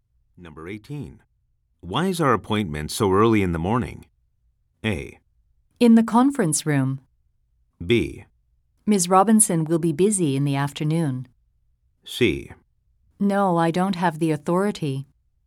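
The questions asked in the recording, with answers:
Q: Why is our appointment so early in the morning?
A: B: Ms. Robinson will be busy in the afternoon.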